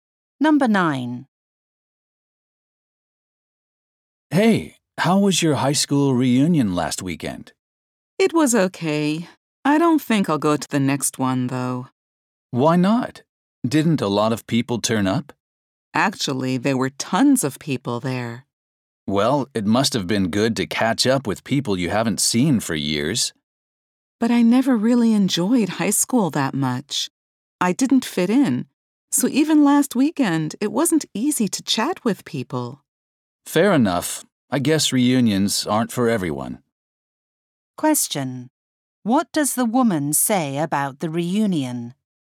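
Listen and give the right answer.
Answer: It was hard for her to talk with people because she never fit in at high school.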